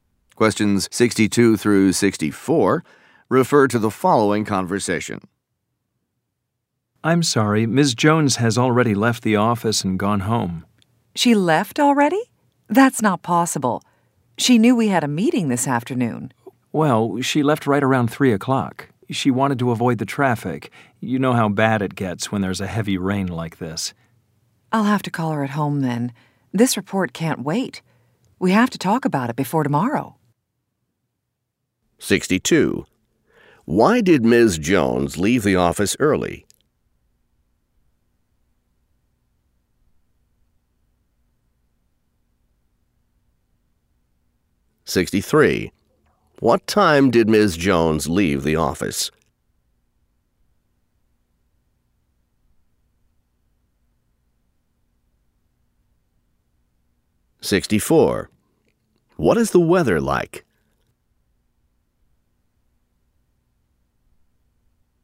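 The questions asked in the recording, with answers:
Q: Why did Ms. Jones leave the office early?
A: To avoid the traffic

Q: What time did Ms. Jones leave the office?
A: Around 3 o'clock

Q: What is the weather like?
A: Heavy rain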